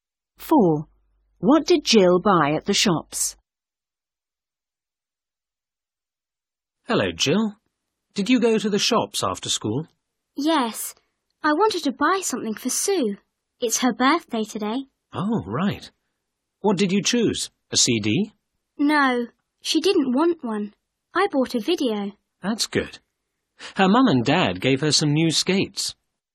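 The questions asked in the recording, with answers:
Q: What did Jill buy at the shops?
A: A video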